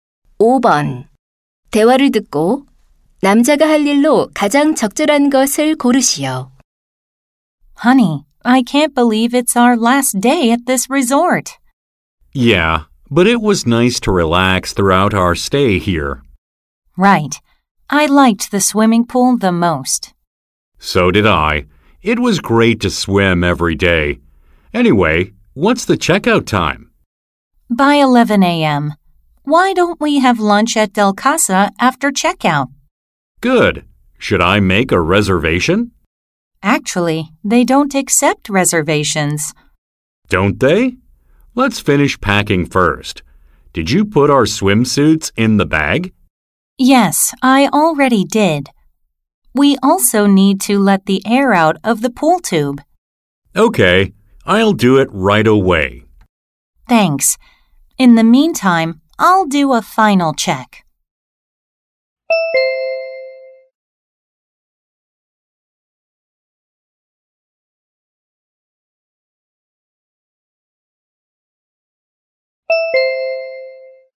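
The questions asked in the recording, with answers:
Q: 대화를 듣고 남자가 할 일로 가장 적절한 것을 고르시오.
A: 수영장 튜브 바람 빼기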